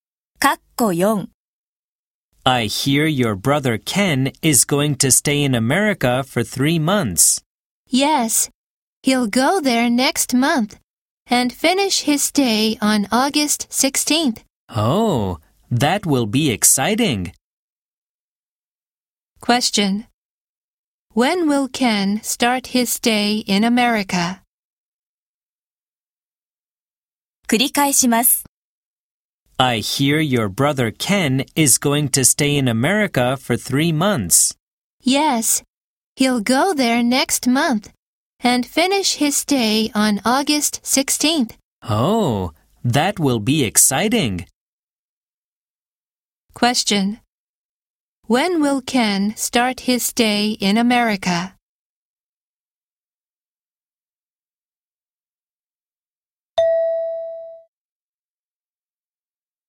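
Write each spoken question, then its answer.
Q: When will Ken start his stay in America?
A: In May (around May 16th)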